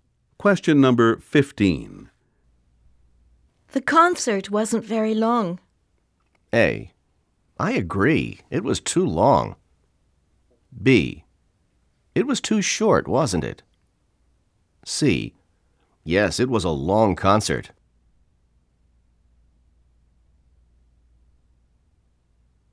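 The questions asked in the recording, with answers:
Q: The concert wasn't very long.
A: B: It was too short, wasn't it?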